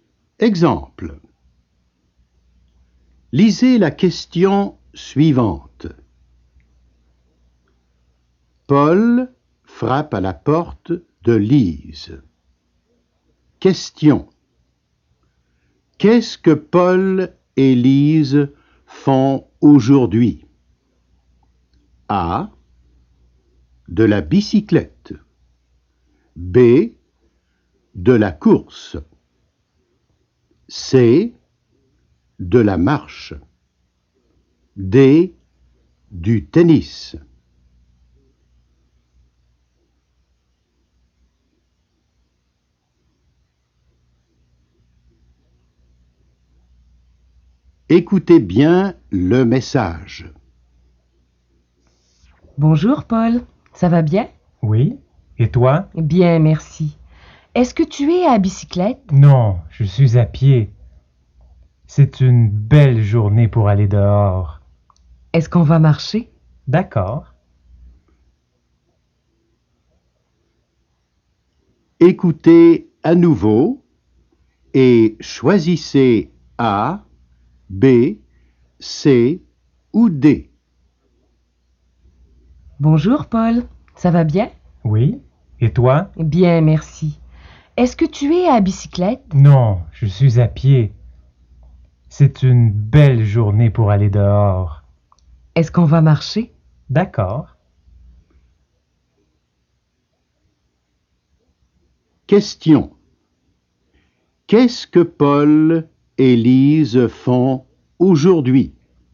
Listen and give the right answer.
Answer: La bonne réponse est donc C.